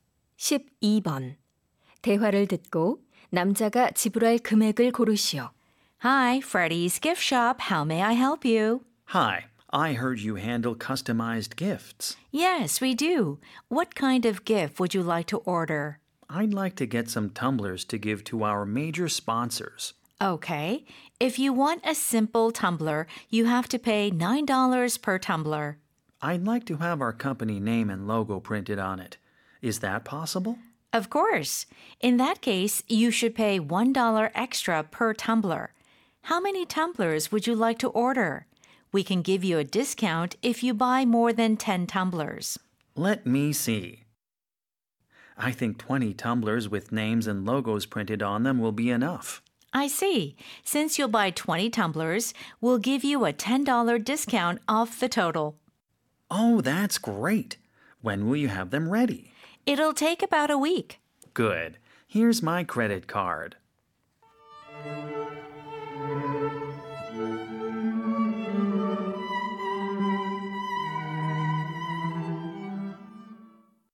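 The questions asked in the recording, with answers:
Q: 대화를 듣고 남자가 지불할 금액을 고르시오.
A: $190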